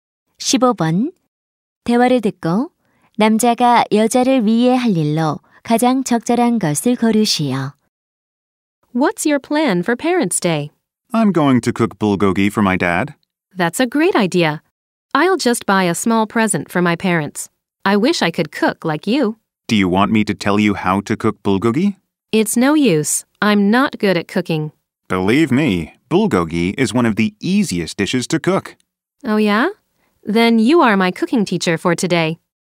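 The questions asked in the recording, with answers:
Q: 대화를 듣고 남자가 여자를 위해 할 일로 가장 적절한 것을 고르시오.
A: 불고기 요리법 가르쳐 주기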